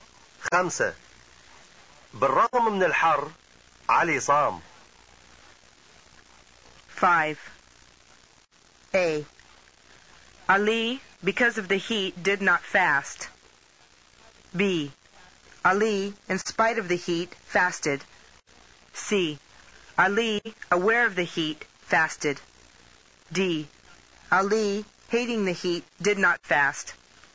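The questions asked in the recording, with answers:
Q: خمسة. بالرغم من الحر علي صام.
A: B: Ali, in spite of the heat, fasted.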